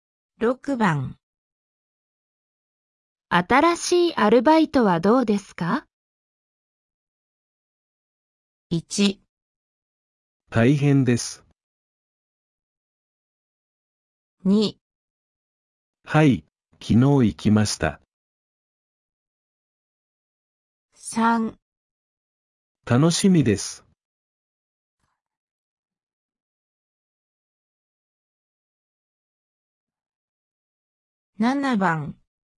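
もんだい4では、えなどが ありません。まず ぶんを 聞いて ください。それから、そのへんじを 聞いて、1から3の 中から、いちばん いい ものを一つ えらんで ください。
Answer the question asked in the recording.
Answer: 1

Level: N4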